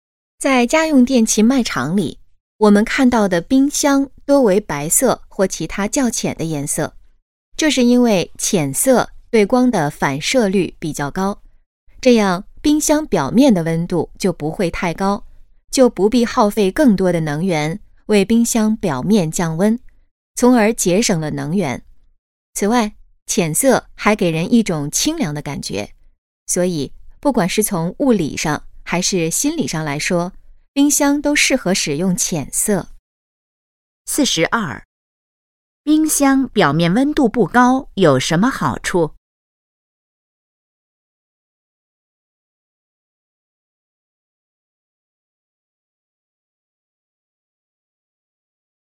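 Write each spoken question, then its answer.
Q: 冰箱表面温度不高有什么好处?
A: 节省能源

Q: 这段话主要谈的是什么?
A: 冰箱为什么多用浅色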